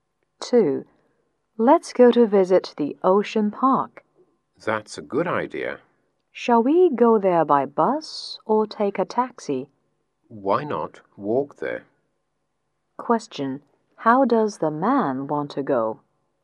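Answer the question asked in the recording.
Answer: On foot (walk).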